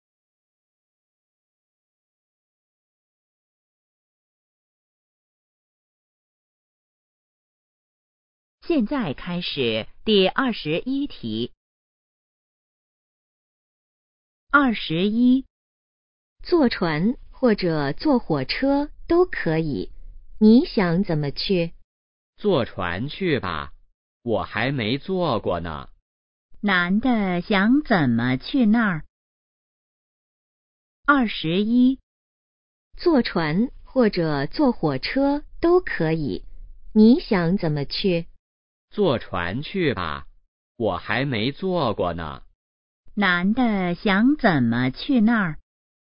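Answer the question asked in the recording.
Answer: 坐船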